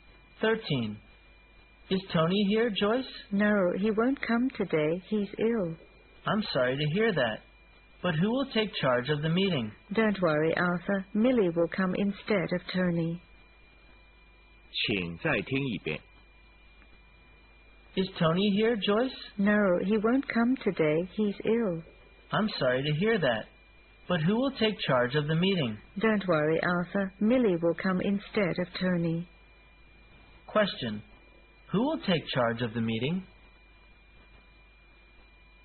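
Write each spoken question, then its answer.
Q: Question. Who will take charge of the meeting?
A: Millie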